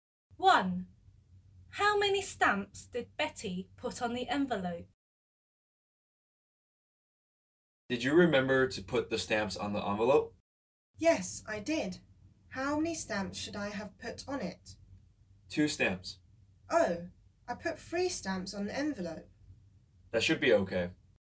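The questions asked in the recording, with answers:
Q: How many stamps did Betty put on the envelope?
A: 3 stamps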